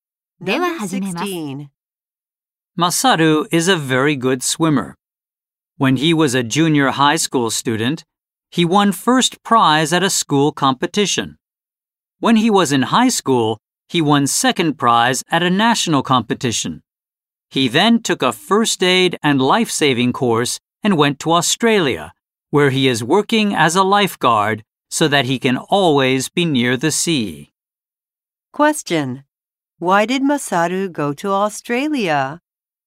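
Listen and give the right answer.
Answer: To work as a lifeguard so he can always be near the sea.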